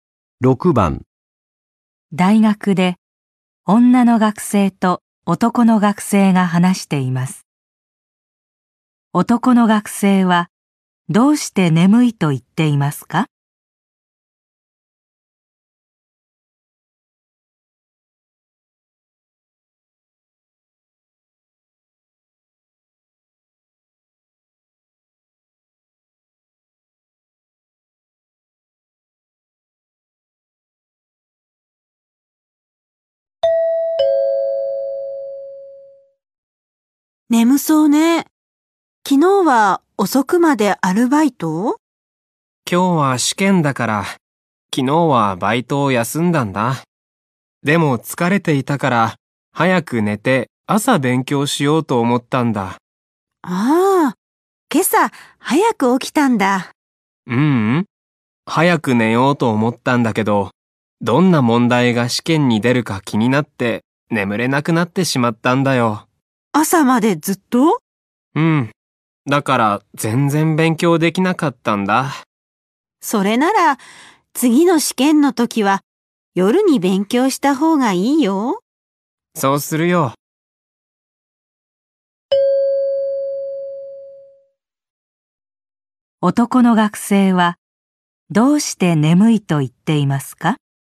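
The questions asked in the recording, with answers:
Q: 男の学生はどうして眠いと言っていますか?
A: 試験が気になって朝まで眠れなかったから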